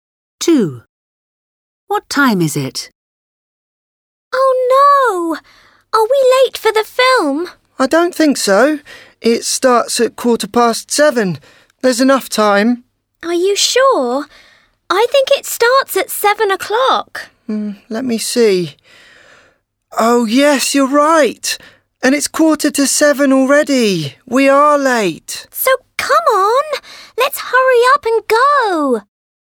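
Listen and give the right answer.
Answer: 7:15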